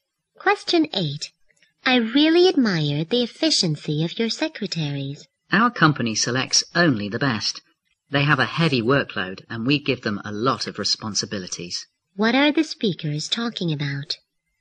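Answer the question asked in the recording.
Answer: The company's efficient secretaries.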